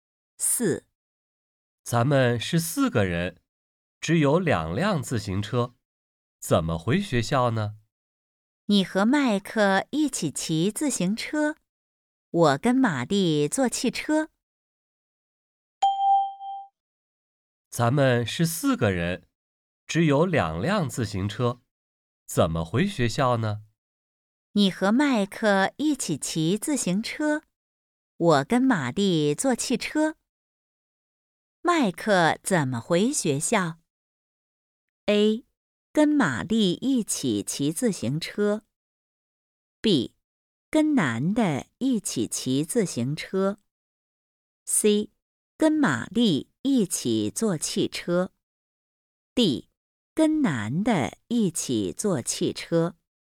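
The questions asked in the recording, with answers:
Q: 麦克怎么回学校?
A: B: 跟男的一起骑自行车。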